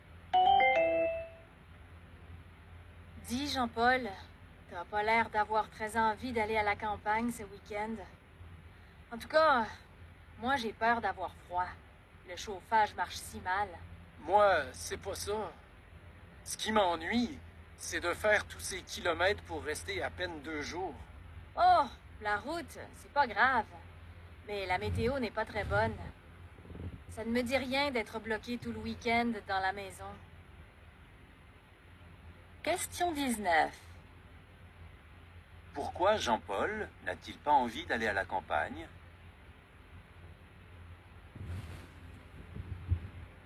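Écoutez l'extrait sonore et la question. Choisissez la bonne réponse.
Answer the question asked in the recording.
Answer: Il trouve que c'est trop de kilomètres pour à peine deux jours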